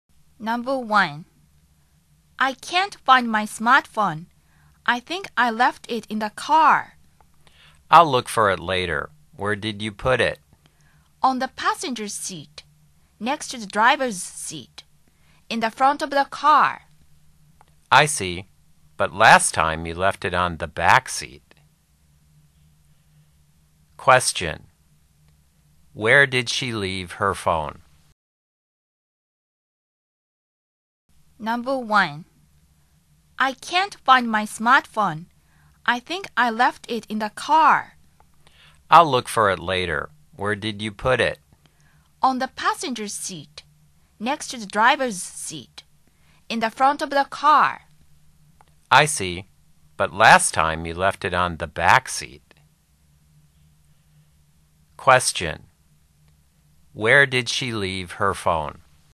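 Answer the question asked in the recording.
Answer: On the passenger seat, in the front of the car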